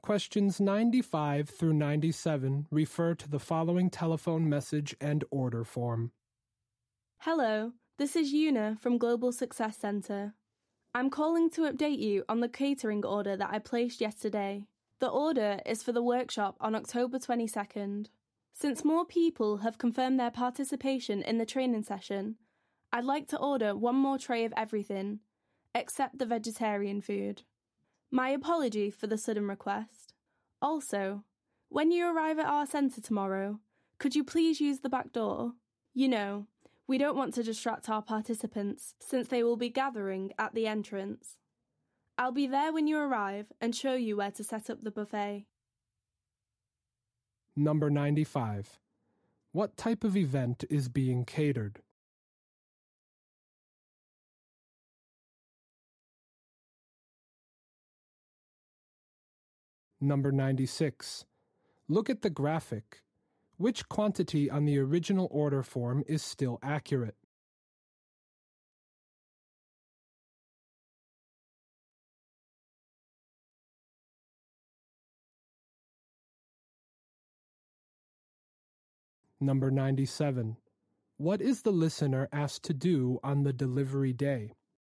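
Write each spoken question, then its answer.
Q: What type of event is being catered?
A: A workshop/training session

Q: What is the listener asked to do on the delivery day?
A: Use the back door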